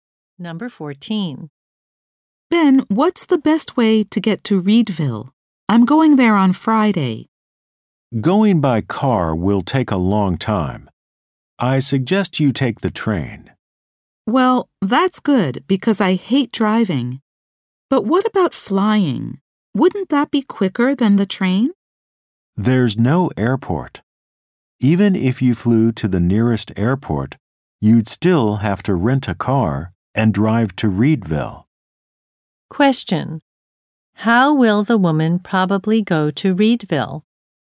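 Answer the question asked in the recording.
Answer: By train.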